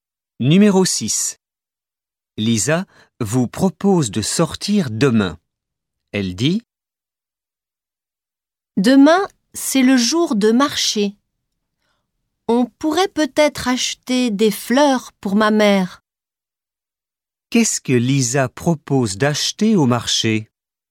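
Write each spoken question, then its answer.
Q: Qu'est-ce que Lisa propose d'acheter au marché?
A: Des fleurs (pour sa mère)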